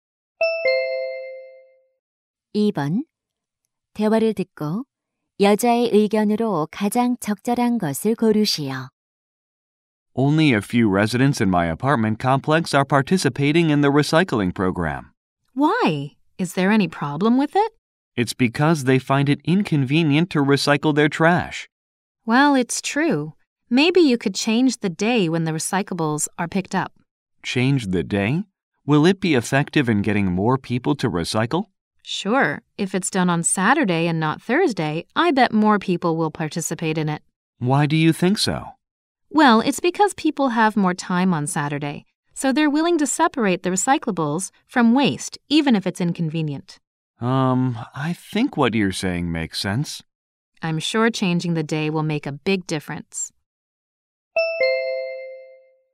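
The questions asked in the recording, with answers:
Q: 대화를 듣고 여자의 의견으로 가장 적절한 것을 고르시오.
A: 재활용품 수거일을 토요일로 바꾸면 참여가 늘어날 것이다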